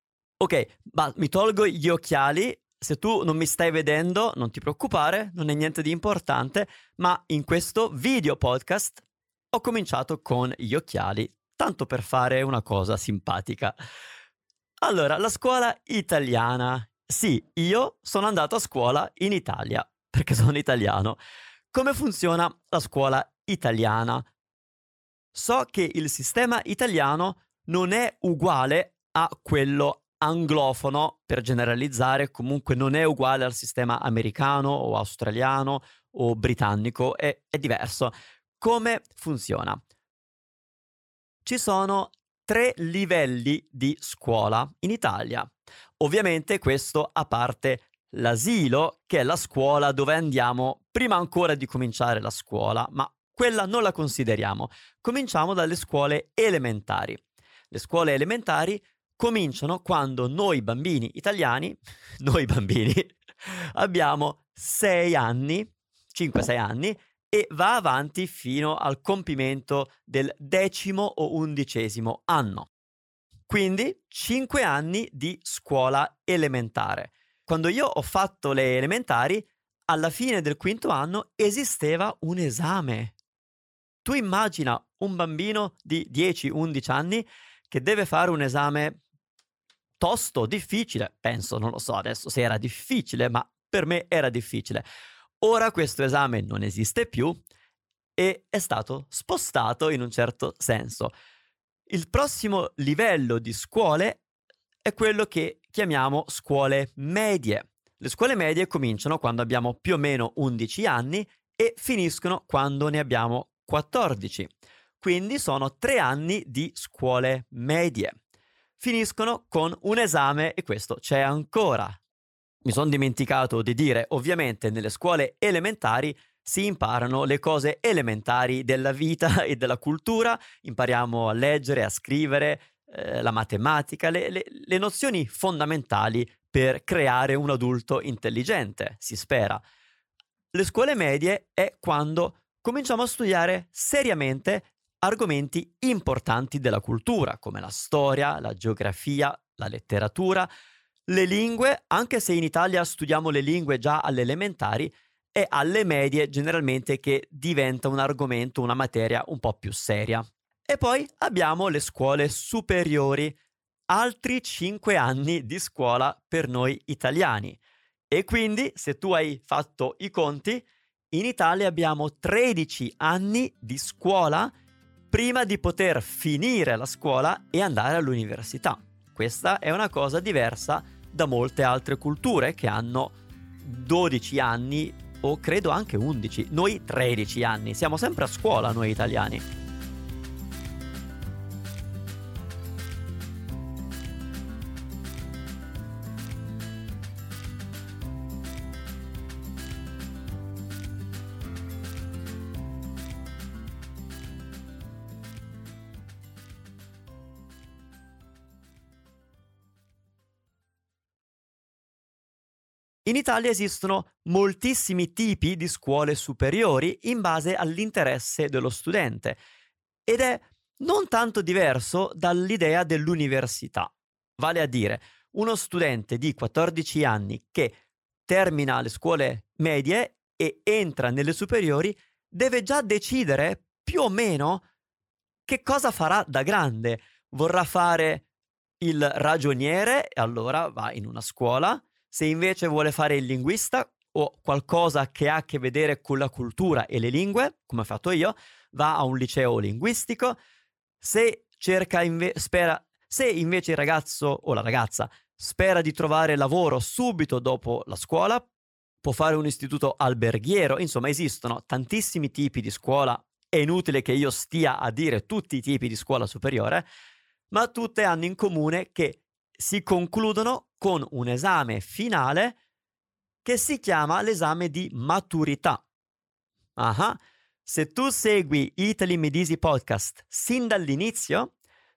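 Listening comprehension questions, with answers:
Here are your TRUE/ FALSE Comprehension questions.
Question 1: Manu non è andato a scuola in Italia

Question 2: La scuola italiana ha gli stessi anni di studio di quella americana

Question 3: In Italia ci sono 3 livelli di scuola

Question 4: In Italia a scuola media dura 5 anni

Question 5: In Italia esistono molti tipi diversi di scuola superiore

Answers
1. Falso
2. Falso
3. Vero
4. Falso
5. Vero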